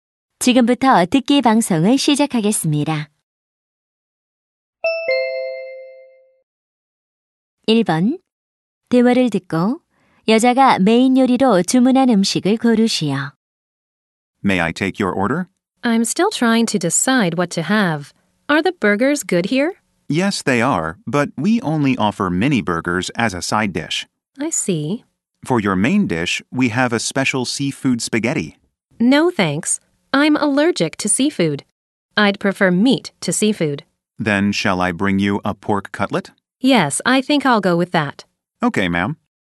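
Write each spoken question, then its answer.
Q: 대화를 듣고 여자가 메인 요리로 주문한 음식을 고르시오.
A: 돈가스 (pork cutlet)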